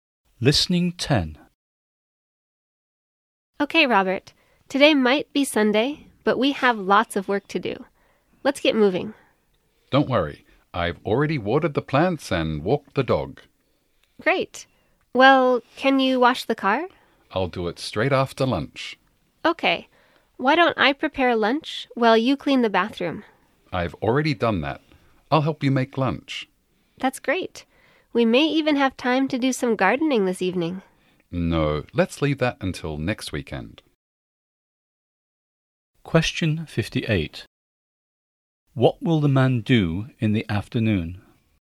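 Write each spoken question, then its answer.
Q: What will the man do in the afternoon?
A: Wash the car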